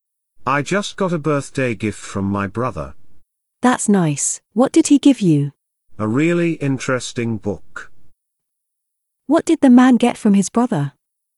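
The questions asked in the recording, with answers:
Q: What did the man get from his brother?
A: A book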